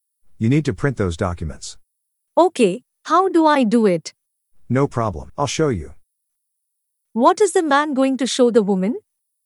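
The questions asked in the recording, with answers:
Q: What is the man going to show the woman?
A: how to print the documents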